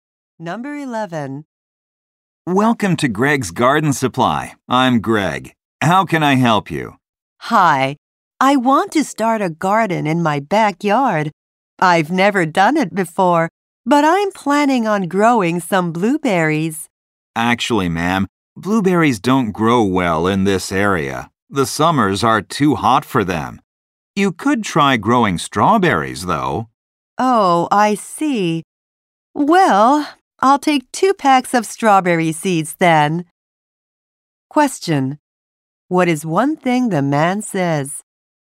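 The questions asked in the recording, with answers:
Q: What is one thing the man says?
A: Blueberries don't grow well in the area because summers are too hot.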